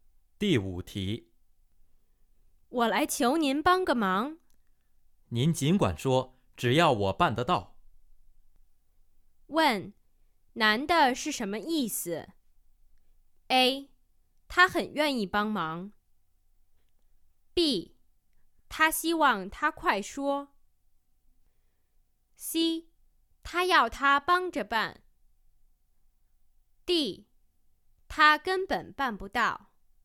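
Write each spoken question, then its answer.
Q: 问,男的是什么意思?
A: A: 他很愿意帮忙。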